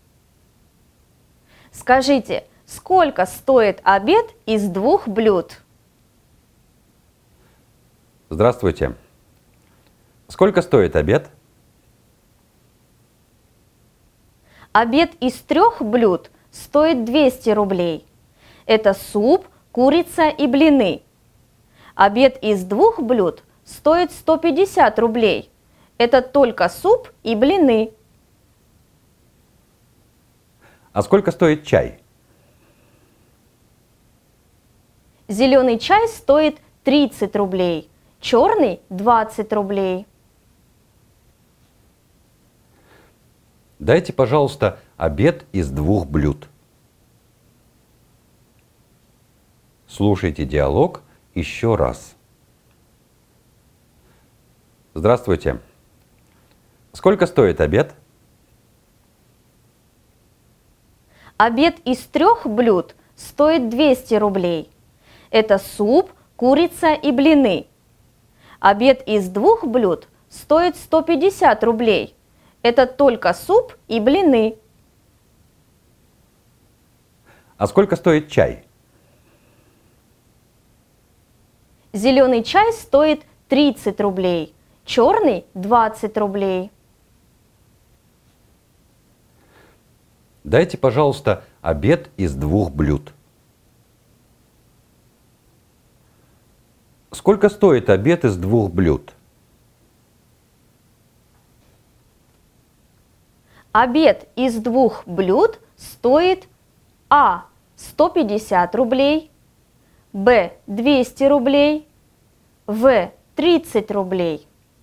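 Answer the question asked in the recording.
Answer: А: 150 рублей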